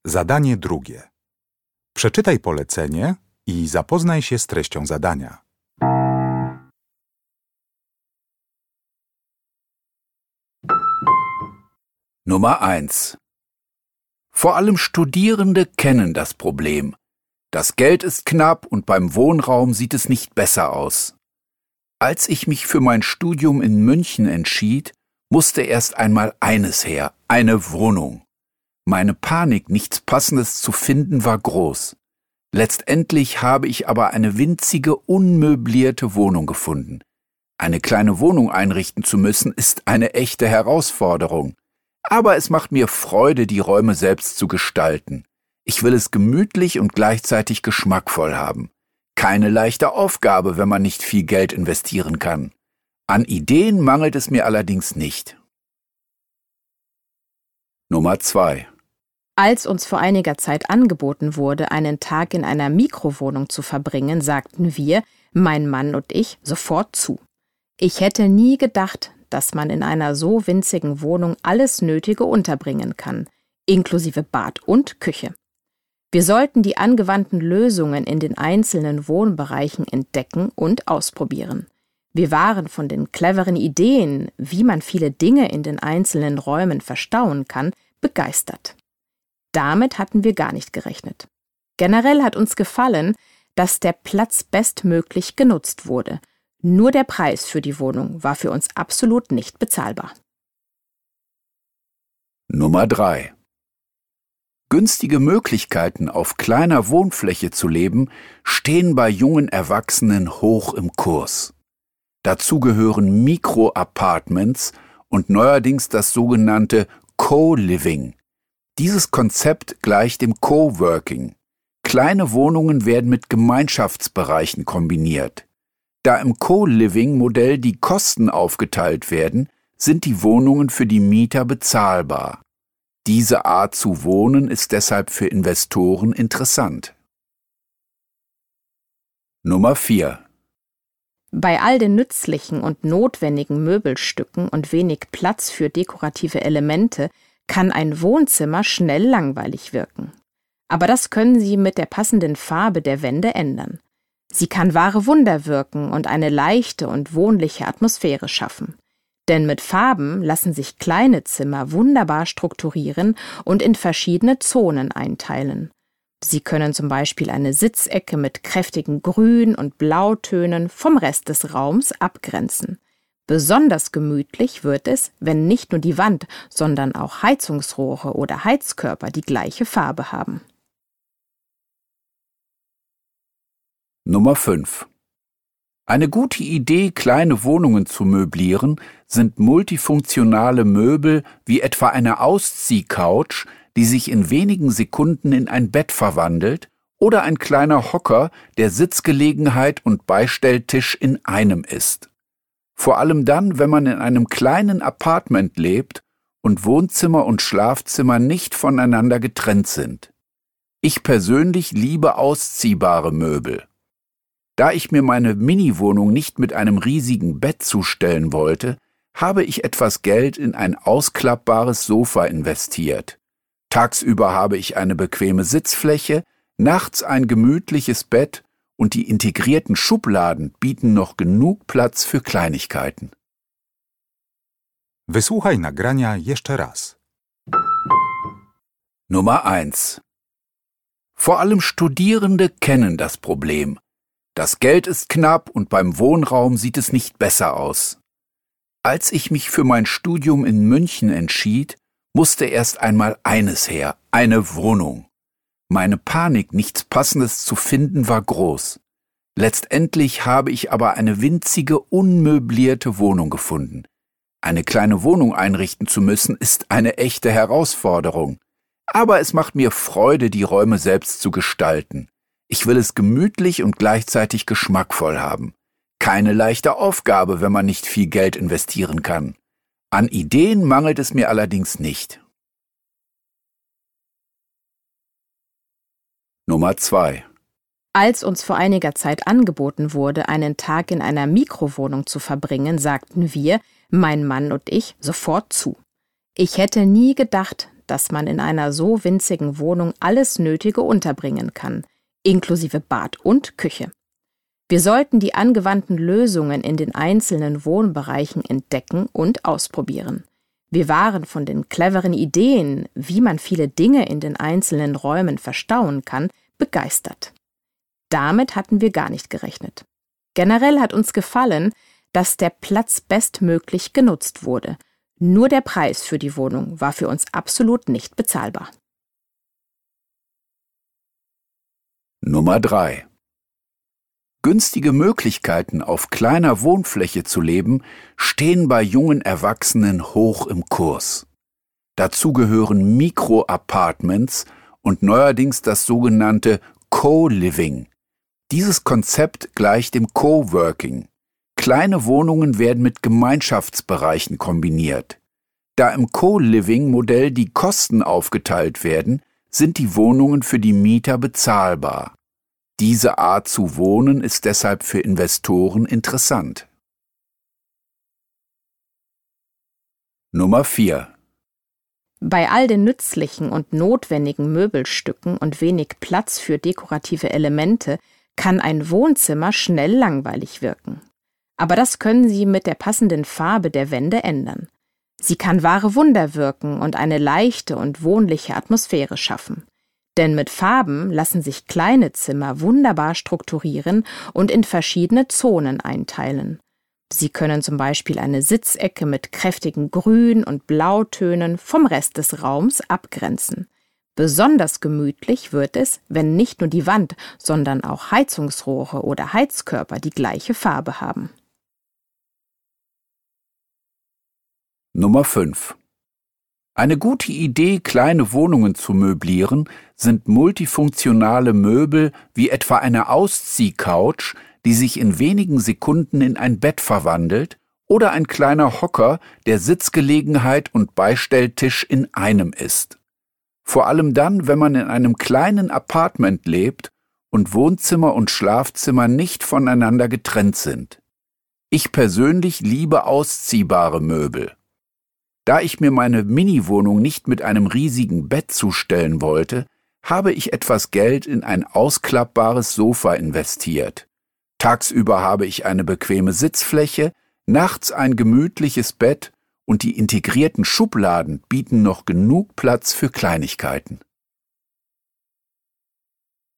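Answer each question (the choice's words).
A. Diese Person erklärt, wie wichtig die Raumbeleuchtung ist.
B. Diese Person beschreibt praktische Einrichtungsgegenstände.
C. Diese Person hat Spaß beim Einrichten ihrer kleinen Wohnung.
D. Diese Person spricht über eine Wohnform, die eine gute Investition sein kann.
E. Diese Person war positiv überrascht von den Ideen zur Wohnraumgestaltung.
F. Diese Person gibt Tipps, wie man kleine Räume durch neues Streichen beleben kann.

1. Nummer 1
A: Diese Person hat Spaß beim Einrichten ihrer kleinen Wohnung.

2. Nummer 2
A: Diese Person war positiv überrascht von den Ideen zur Wohnraumgestaltung.

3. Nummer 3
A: Diese Person spricht über eine Wohnform, die eine gute Investition sein kann.

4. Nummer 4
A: Diese Person gibt Tipps, wie man kleine Räume durch neues Streichen beleben kann.

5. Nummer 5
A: Diese Person beschreibt praktische Einrichtungsgegenstände.

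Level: Poziom: rozszerzony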